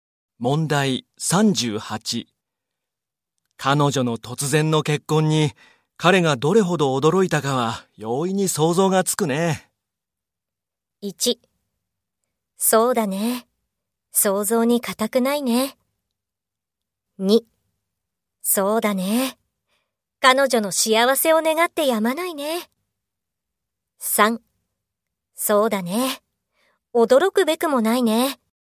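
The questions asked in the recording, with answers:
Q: 彼女の突然の結婚に彼がどれほど驚いたかは容易に想像がつくね。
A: 1: そうだね。想像に難くないね。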